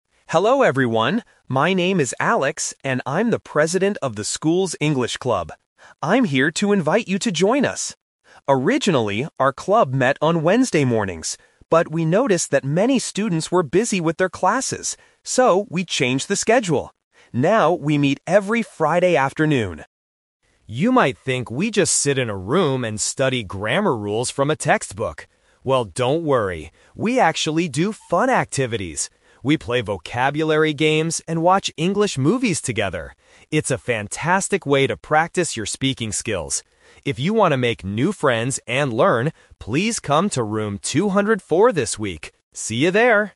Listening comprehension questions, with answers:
Listen to the announcement and circle the correct answer (A, B, or C).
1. When does the English Club meet now?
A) On Wednesday mornings.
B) On Friday afternoons.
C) On Friday mornings.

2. Why did the club change its schedule?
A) Because the club president was busy.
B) Because many students had classes.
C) Because they wanted to watch movies.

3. What do the students do in the English Club?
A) Study grammar rules from a book.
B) Do their English homework.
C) Play games and watch movies.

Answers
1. B
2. B
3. C

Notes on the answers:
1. Alex clearly states the new schedule: "Now, we meet every Friday afternoon." Why the trap is wrong: Option (A) is the trap (The Twist). The club "originally" met on Wednesday mornings, but they changed the time. Option (C) is a mix of the wrong time and right day.
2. Alex explains the reason for the change: "But we noticed that many students were busy with their classes." Why the trap is wrong: Option (A) is a plausible guess, but the president (Alex) wasn't the one who was busy; the students were. Option (C) is the trap because watching movies is what they do at the club, not the reason they changed the time.
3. Alex tells the students about the fun activities: "We play vocabulary games and watch English movies together." Why the trap is wrong: Option (A) is the trap. Alex says, "You might think we just sit in a room and study grammar rules... Well, don't worry!" meaning they do not do this. Option (B) was not mentioned.

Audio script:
My name is Alex, and I'm the president of the school's English Club. I'm here to invite you to join us. Originally, our club met on Wednesday mornings. But we noticed that many students were busy with their classes. So, we changed the schedule. Now, we meet every Friday afternoon.
You might think we just sit in a room and study grammar rules from a textbook. Well, don't worry! We actually do fun activities. We play vocabulary games and watch English movies together. It's a fantastic way to practice your speaking skills. If you want to make new friends and learn, please come to Room 204 this week. See you there!

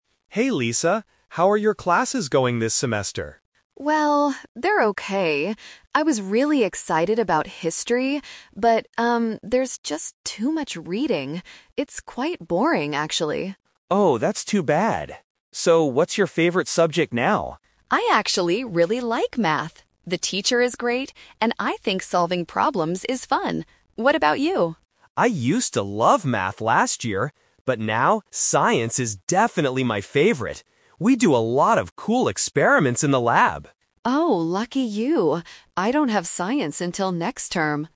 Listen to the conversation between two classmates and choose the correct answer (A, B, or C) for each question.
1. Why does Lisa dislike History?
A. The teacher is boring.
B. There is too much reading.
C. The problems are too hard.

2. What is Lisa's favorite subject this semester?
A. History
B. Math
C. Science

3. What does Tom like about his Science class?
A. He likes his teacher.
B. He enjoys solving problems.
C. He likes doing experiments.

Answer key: 1B, 2B, 3C

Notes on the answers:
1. Lisa says, "...there's just too much reading. It's quite boring...". Why the traps are wrong: Option (A) is plausible but not mentioned in the audio. Option (C) mentions "problems," which she uses later to talk about Math, not History.
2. Lisa clearly states, "I actually really like Math." Why the traps are wrong: Option (A) is the "Twist Trap"; she was excited about History at first, but then changed her mind because it had too much reading. Option (C) is a trap because Science is Tom's favorite subject, not Lisa's.
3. Tom says about Science, "We do a lot of cool experiments in the lab." Why the traps are wrong: Option (A) and Option (B) are the reasons Lisa likes Math (she mentions the teacher is great and solving problems is fun), so they are incorrect for Tom's Science class.

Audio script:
Tom: Hey Lisa, how are your classes going this semester?
Lisa: Well, they're okay. I was really excited about History, but... um, there's just too much reading. It's quite boring, actually.
Tom: Oh, that's too bad. So, what's your favorite subject now?
Lisa: I actually really like Math. The teacher is great, and I think solving problems is fun. What about you?
Tom: I used to love Math last year. But now, Science is definitely my favorite. We do a lot of cool experiments in the lab.
Lisa: Oh, lucky you! I don't have Science until next term.

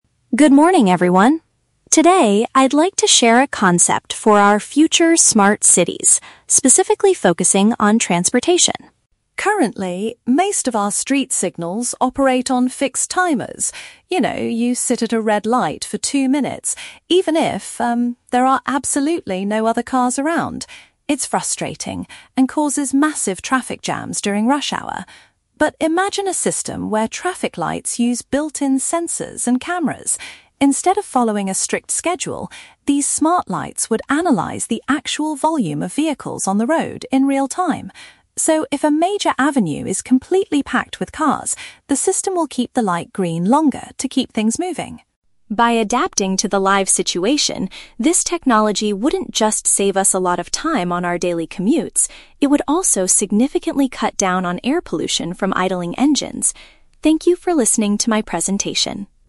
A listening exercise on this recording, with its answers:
Listen to a student giving a presentation and choose the correct answer (A, B, or C) for each question.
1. What is the main problem with the traffic lights we use today?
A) They follow a set schedule regardless of the traffic situation.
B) They frequently break down when there are too many cars.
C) They are too expensive to install in modern cities.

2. How will the proposed smart street signals work?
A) They will turn off completely when the roads are empty.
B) They will adjust their colors based on the number of cars present.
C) They will use cameras to catch drivers who are speeding.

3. According to the speaker, what is an additional benefit of this new system?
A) It will reduce the cost of public transportation.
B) It will prevent accidents at very busy intersections.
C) It will decrease the amount of harmful emissions in the air.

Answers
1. A
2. B
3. C

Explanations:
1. The speaker says current lights "operate on fixed timers" and follow a "strict schedule," even when "there are absolutely no other cars around." Why the trap is wrong: Option (B) is a trap. The speaker mentions "traffic jams" and "volume of vehicles," but never says the lights break down. Option (C) is plausible but not mentioned in the audio.
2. The speaker explains the system will "analyze the actual volume of vehicles" and "keep the light green longer" if an avenue is packed. This means adjusting colors based on car numbers. Why the trap is wrong: Option (A) is a trap. The speaker mentions a situation where there are "no other cars around" to highlight the flaw of current lights, not to say the new lights will turn off. Option (C) is a trap because "cameras" are mentioned, but they are used to analyze traffic volume, not to catch speeding drivers.
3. The speaker concludes that the technology will "cut down on air pollution from idling engines." "Decrease harmful emissions" is a direct paraphrase of cutting down air pollution. Why the trap is wrong: Option (A) is a trap. The speaker mentions "daily commutes" (going to work/school), but does not talk about the cost of public transportation. Option (B) is highly plausible for a traffic system, but it is never mentioned in the presentation.

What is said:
Student: Good morning, everyone. Today, I'd like to share a concept for our future smart cities, specifically focusing on transportation.
Currently, most of our street signals operate on fixed timers. You know, you sit at a red light for two minutes, even if, um, there are absolutely no other cars around. It's frustrating and causes massive traffic jams during rush hour. But imagine a system where traffic lights use built-in sensors and cameras. Instead of following a strict schedule, these smart lights would analyze the actual volume of vehicles on the road in real-time. So, if a major avenue is completely packed with cars, the system will keep the light green longer to keep things moving.
By adapting to the live situation, this technology wouldn't just save us a lot of time on our daily commutes; it would also significantly cut down on air pollution from idling engines. Thank you for listening to my presentation.

